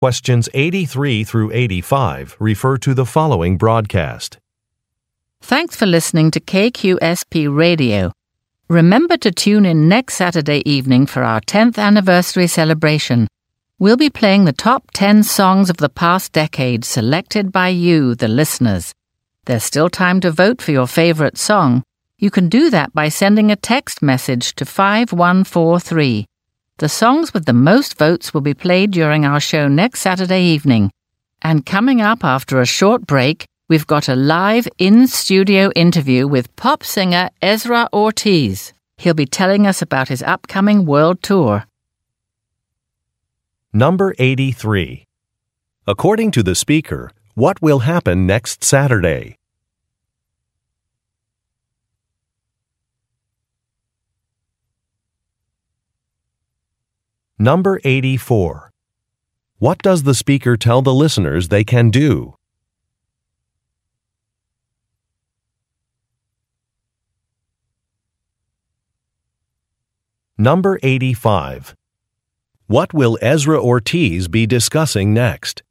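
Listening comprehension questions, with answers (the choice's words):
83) According to the speaker. what will happen next Saturday?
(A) A recording session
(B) A fund-raising dinner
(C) A grand opening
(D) An anniversary celebration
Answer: An anniversary celebration

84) What does the speaker tell the listeners they can do?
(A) Vote for their favorite songs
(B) Take a quiz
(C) Post questions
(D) Donate money to the radio station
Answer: Vote for their favorite songs

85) What will Ezra Ortiz be discussing next?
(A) His song-writing process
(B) The release of a new song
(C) An upcoming tour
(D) Music programs in schools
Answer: An upcoming tour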